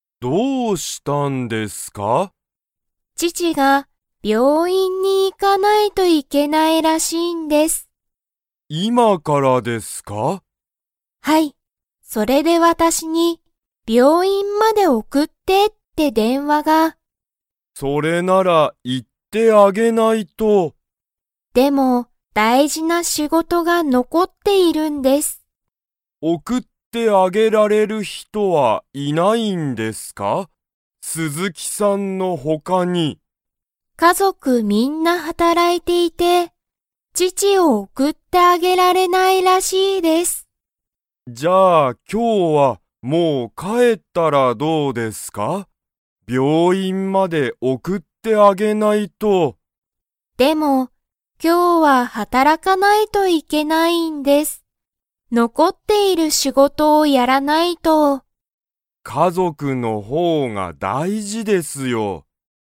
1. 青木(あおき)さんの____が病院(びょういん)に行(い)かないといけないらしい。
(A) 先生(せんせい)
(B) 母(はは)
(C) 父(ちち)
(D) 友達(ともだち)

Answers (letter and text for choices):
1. (C) 父(ちち)

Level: Level 2